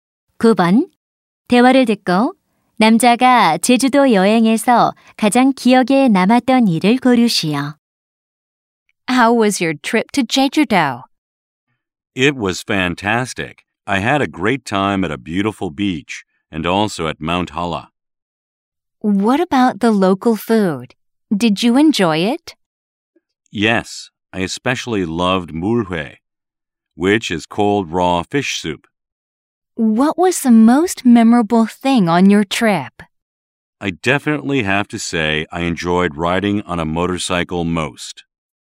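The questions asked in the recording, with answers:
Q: 대화를 듣고 남자가 제주도 여행에서 가장 기억에 남았던 일을 고르시오.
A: 오토바이 타기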